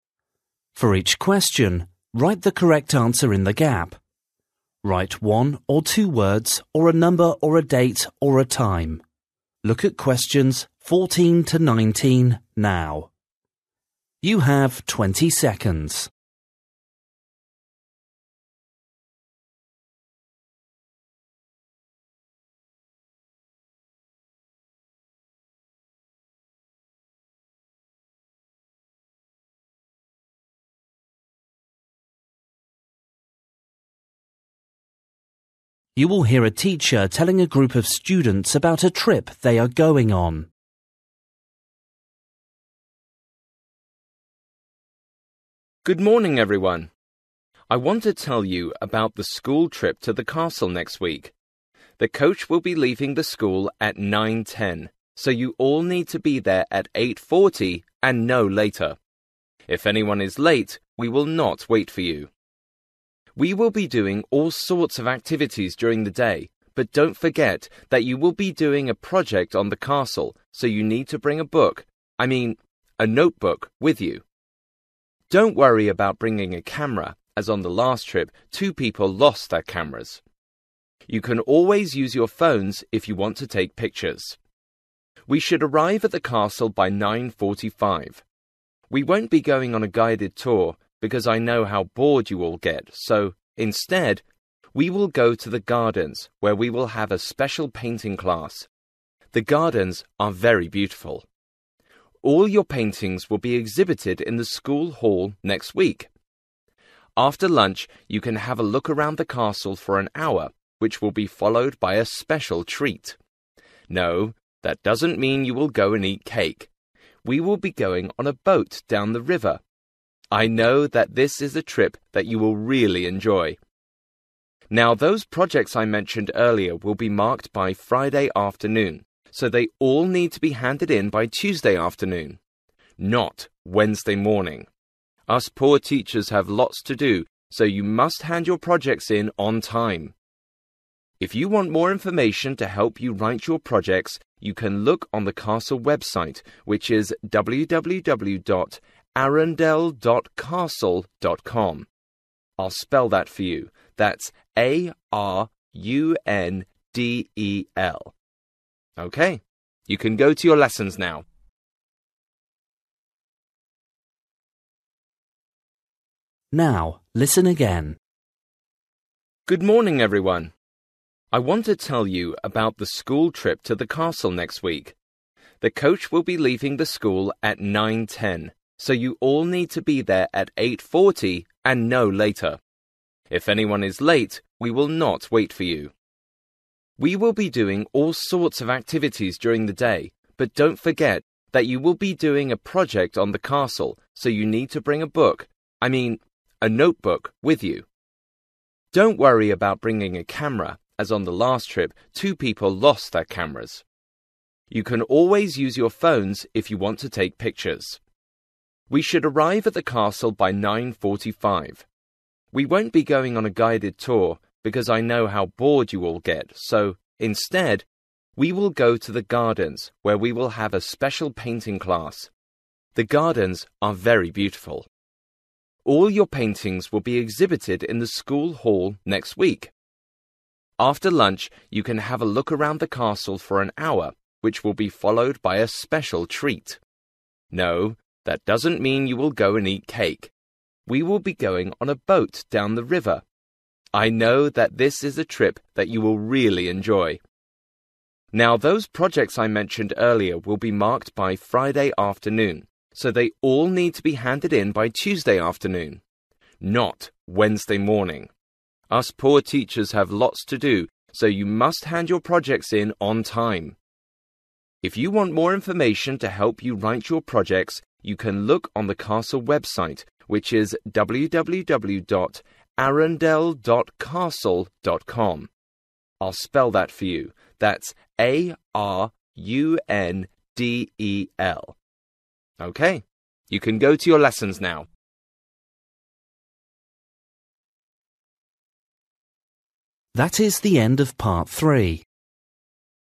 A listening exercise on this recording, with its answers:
For each question, write the correct answer in the gap. Write one or two words or a number or a date or a time.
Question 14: Time to meet at school gate:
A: 8.40 / eight forty

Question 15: a (15) .....................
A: notebook

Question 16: (16) ..................... in the garden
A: painting

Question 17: trip on a (17) .....................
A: boat

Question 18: Hand in projects by:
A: Tuesday (afternoon)

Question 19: (19) www. ..................... .castle.com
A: arundel

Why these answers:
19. you can look on the castle website which is www dot Arundel dot castle dot com. I'll spell that for you, that A-R-U-N-D-E-L.

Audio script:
For each question, write the correct answer in the gap. Write one or two words or a number or a date or a time.
You will hear a teacher telling a group of students about a trip they are going on.
I want to tell you about the school trip to the castle next week. (14) The coach will be leaving the school at 9.10 so you all need to be there at 8.40 and no later. If anyone is late we will not wait for you.
We will be doing all sorts of activities during the day but (15) don't forget that you will be doing a project on the castle so you need to bring a book, I mean a notebook with you. Don't worry about bringing a camera as on the last trip two people lost their cameras. You can always use your phones if you want to take pictures.
(16) We should arrive at the castle by 9.45. We won't be going on a guided tour because I know how bored you all get, so, instead, we will go to the gardens where we will have a special painting class; the gardens are very beautiful. All your paintings will be exhibited in the school hall next week.
(17) After lunch you can have a look around the castle for an hour which will be followed by a special treat. No that doesn't mean you will go and eat cake, we will be going on a boat down the river. I know that this is a trip that you will really enjoy.
(18) Now those projects I mentioned earlier will be marked by Friday afternoon so they all need to be handed in by Tuesday afternoon. Not Wednesday morning! Us poor teachers have lots to do so you must hand your projects in on time.
If you want more information to help you write your projects, (19) you can look on the castle website which is www dot Arundel dot castle dot com. I'll spell that for you, that A-R-U-N-D-E-L.
OK, you can go to your lessons now.

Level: PET (B1)